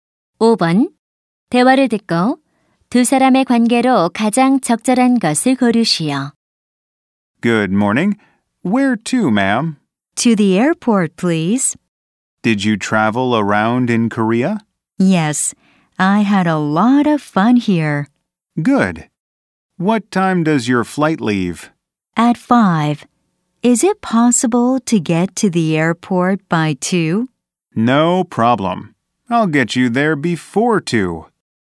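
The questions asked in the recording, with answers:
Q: 대화를 듣고 두 사람의 관계로 가장 적절한 것을 고르시오.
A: 택시 기사와 승객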